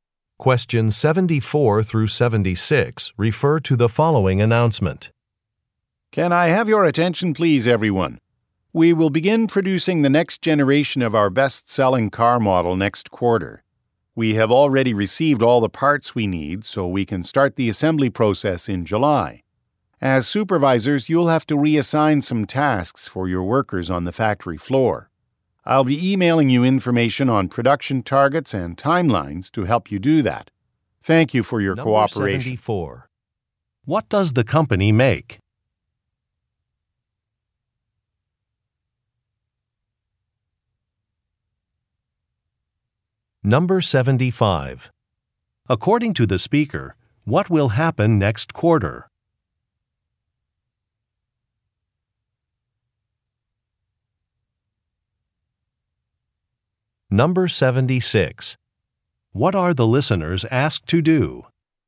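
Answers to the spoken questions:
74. Cars
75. Production of the next generation of its best-selling car model will begin
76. Reassign some tasks for their workers on the factory floor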